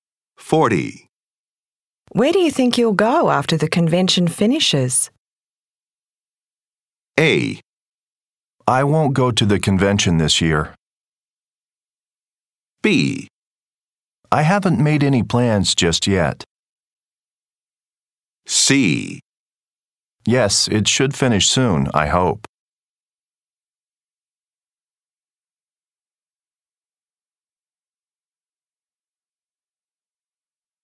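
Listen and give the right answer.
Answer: B: I haven't made any plans just yet.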